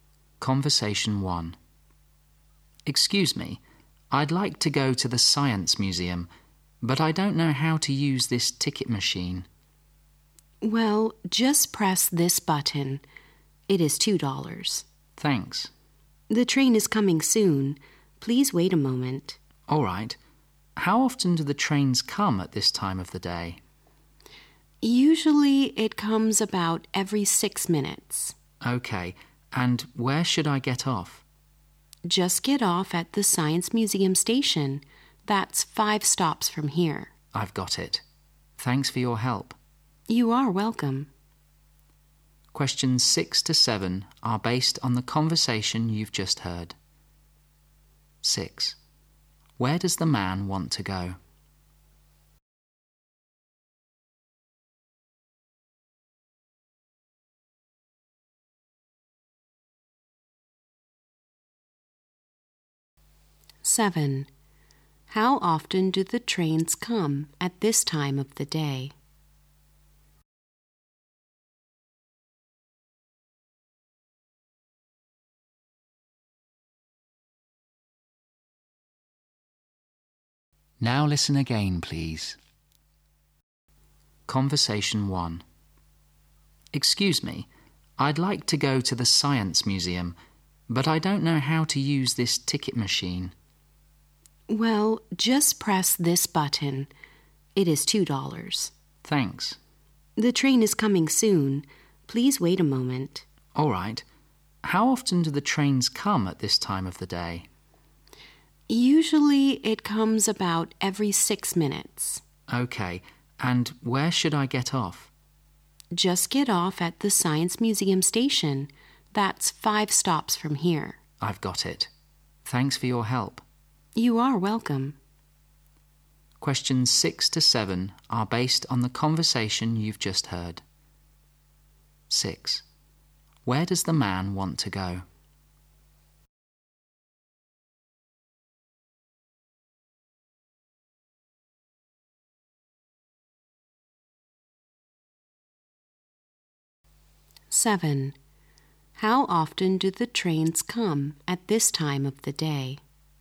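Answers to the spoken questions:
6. The Science Museum
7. About every 6 minutes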